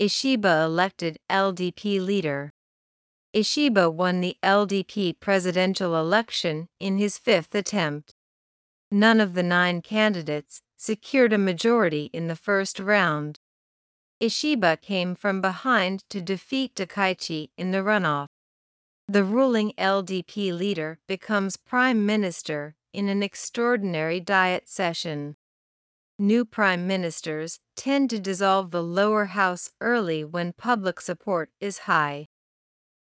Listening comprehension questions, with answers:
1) Ishiba won the LDP ( ).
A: presidential election in his fifth attempt

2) None of the nine candidates ( ).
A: secured a majority in the first round

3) Ishiba ( ) Takaichi in the runoff.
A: came from behind to defeat

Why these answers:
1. 「fifth attempt(5回目の挑戦)」と序数を使う場合は「5回目」だけに焦点を当てるため、続く名詞も「attempt」と単数形になります。また、語尾の音も単数と複数では違います。
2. 「a majority」と不定冠詞を使うのは、「状況によって過半数の基準が変わり得るとき」です。 今回の選挙では、投票の総数が(白票や無効票によって)変動する可能性があるため、確実に「過半数=何票」と特定することができません。よって「a majority」 が適切です。 国会などの議決で「過半数」を表すときは、通常「a majority」が使われます。これは、「過半数となる票数」が常に流動的であるためです。
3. 不定詞「to」を目的の用法と解釈すると、「石破氏が、高市氏を打ち負かすために逆転した」という不自然な意味になります。 この「to」は結果を表す不定詞で、「石破氏が逆転した結果、高市氏を逆転した」と訳します。「came from behind and defeated」と書き換えても、ほぼ同じ意味になります。

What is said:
Ishiba Elected LDP Leader
Ishiba won the LDP presidential election in his fifth attempt.
None of the nine candidates secured a majority in the first round.
Ishiba came from behind to defeat Takaichi in the runoff.
The ruling LDP leader becomes Prime Minister in an extraordinary Diet session.
New Prime Ministers tend to dissolve the Lower House early when public support is high.